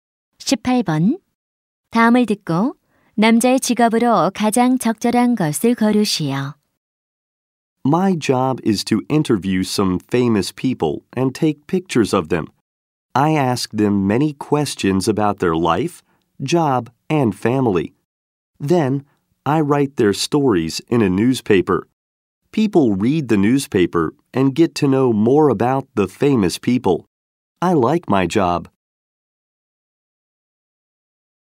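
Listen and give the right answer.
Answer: 신문 기자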